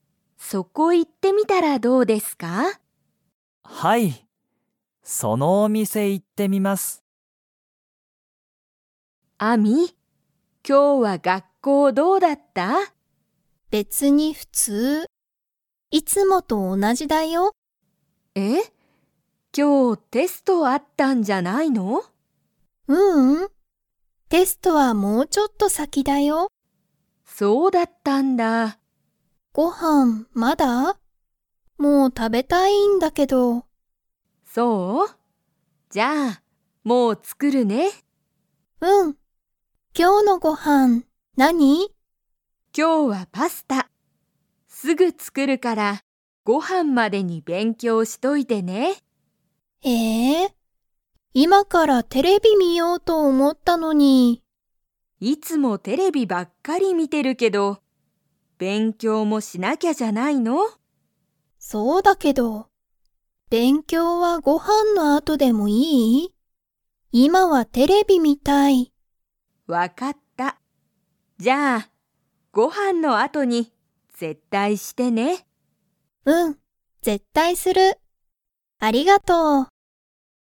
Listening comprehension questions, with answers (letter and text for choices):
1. アミは今日きょう、テストがありましたか?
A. はい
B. いいえ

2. アミは、ご飯はんの後あとに____。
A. テレビを観みる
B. パスタを作つくる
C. 勉強べんきょうする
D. テストがある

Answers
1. B. いいえ
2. C. 勉強べんきょうする

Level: Level 2